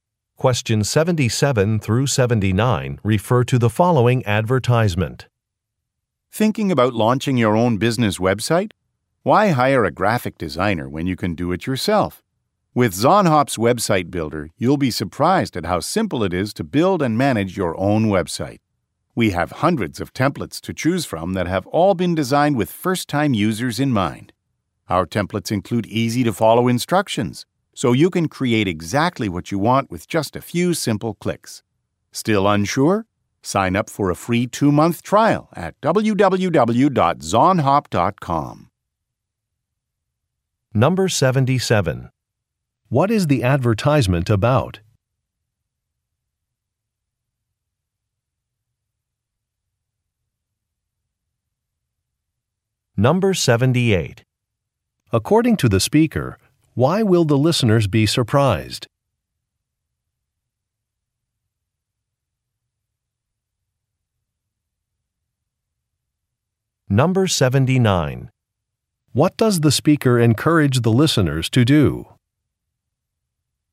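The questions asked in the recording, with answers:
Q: What is the advertisement about?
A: A website builder

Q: According to the speaker, why will the listeners be surprised?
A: It is simple to use

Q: What does the speaker encourage the listeners to do?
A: Sign up for a free trial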